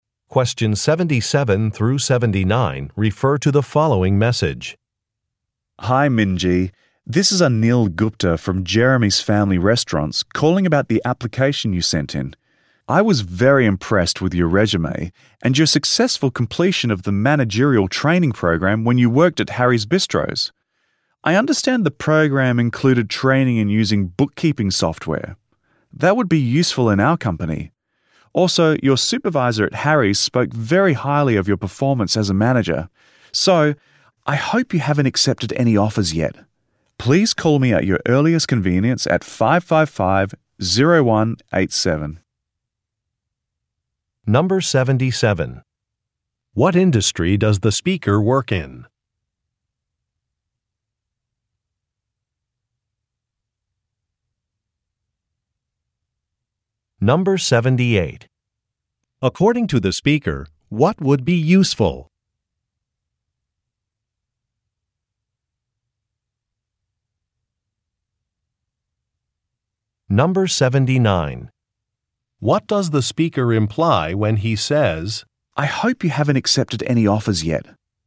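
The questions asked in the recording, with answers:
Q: What industry does the speaker work in?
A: The restaurant industry

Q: According to the speaker, what would be useful?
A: Her training in using bookkeeping software

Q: What does the speaker imply when he says,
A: He wants to offer her a job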